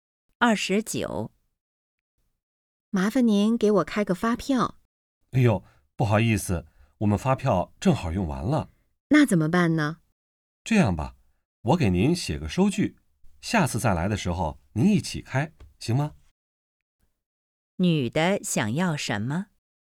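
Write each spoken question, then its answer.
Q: 女的想要什么?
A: 发票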